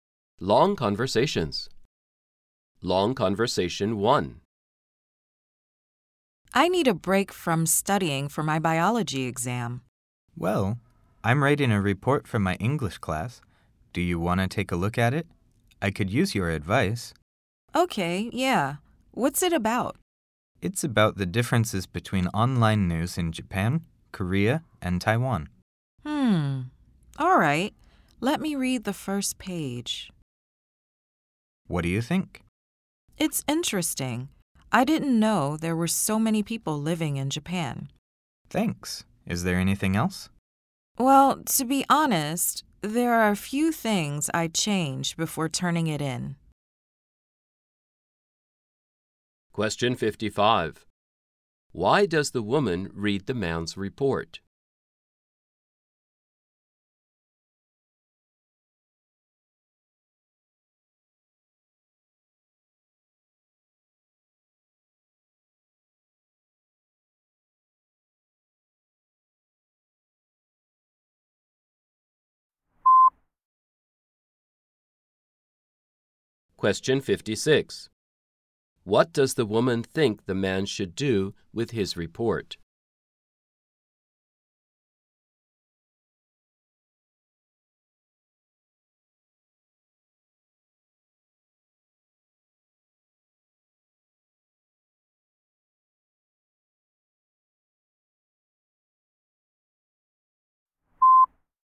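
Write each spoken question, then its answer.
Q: Why does the woman read the man's report?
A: He asked for her advice, and she needed a break from studying

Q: What does the woman think the man should do with his report?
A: Change a few things before turning it in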